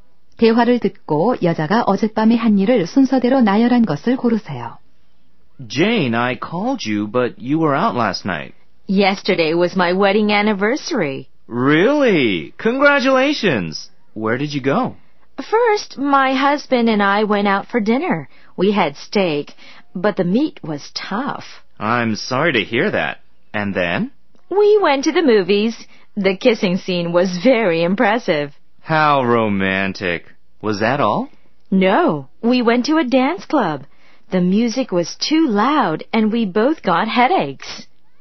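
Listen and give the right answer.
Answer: 저녁 식사 → 영화 관람 → 댄스 클럽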